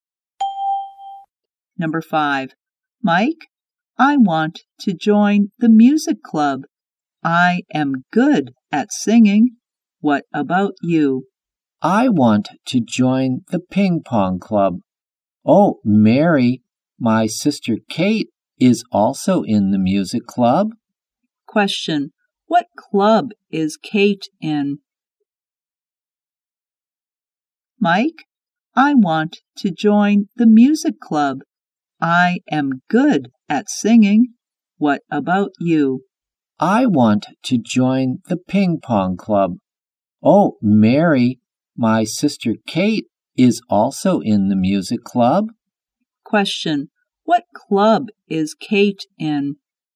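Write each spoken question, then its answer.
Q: What club is Kate in?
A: The music club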